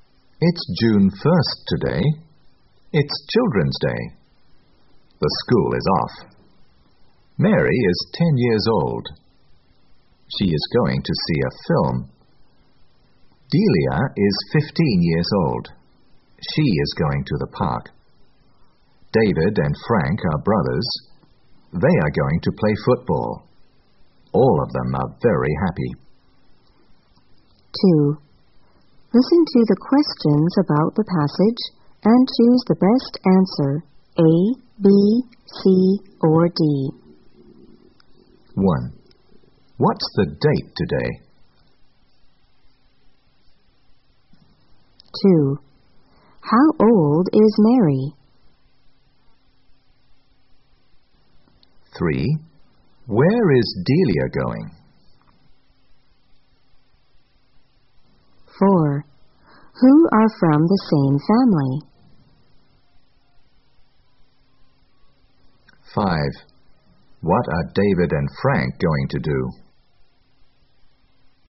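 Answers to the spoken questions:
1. June 1st
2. 10 years old
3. To the park
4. David and Frank
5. Play football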